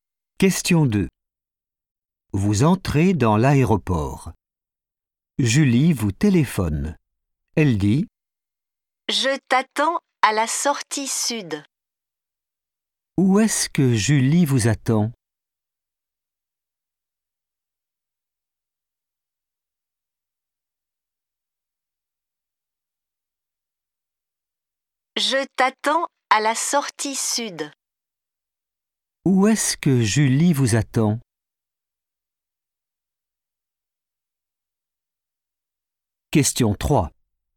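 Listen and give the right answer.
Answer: à la sortie sud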